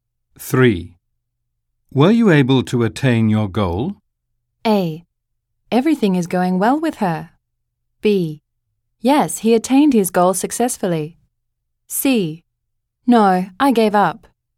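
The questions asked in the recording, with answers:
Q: Were you able to attain your goal?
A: C: No, I gave up.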